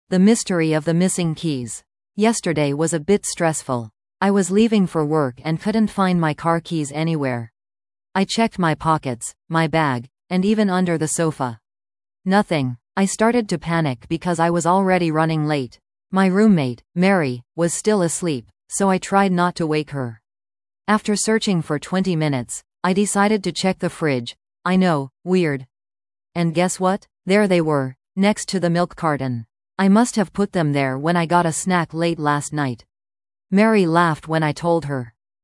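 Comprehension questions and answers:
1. What was the narrator looking for yesterday morning?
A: His car keys

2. Where did the narrator first look for the missing item?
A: In his pockets

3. Where were the keys finally found?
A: In the fridge, next to the milk carton

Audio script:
The Mystery of the Missing Keys
Yesterday was a bit stressful. I was leaving for work and couldn't find my car keys anywhere! I checked my pockets, my bag, and even under the sofa. Nothing! I started to panic because I was already running late. My roommate, Mary, was still asleep, so I tried not to wake her. After searching for twenty minutes, I decided to check the fridge - I know, weird! And guess what? There they were, next to the milk carton! I must have put them there when I got a snack late last night. Mary laughed when I told her.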